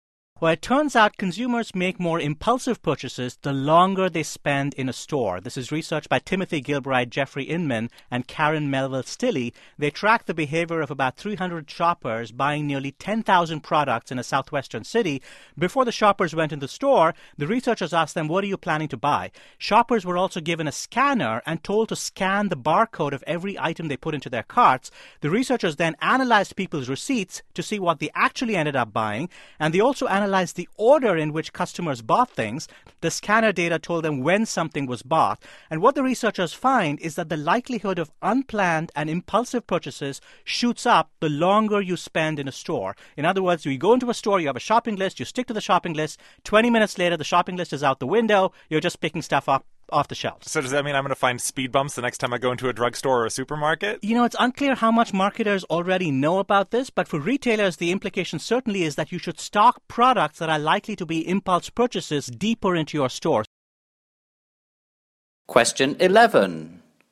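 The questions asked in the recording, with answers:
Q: Why does the interviewer ask if he should expect to see speed bumps in supermarkets?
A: Because shoppers buy more on impulse the longer they stay, so stores might try to slow them down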